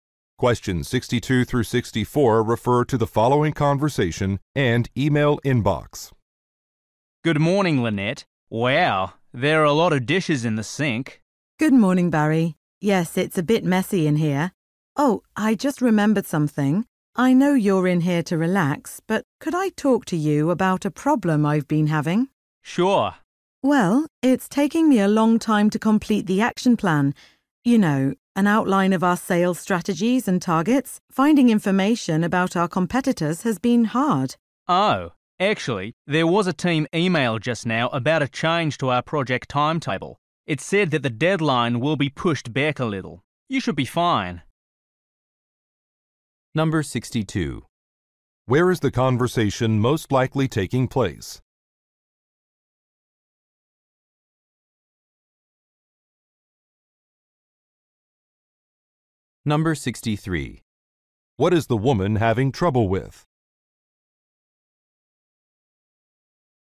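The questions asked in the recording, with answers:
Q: What is the woman having trouble with?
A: Finding information about competitors for an action plan.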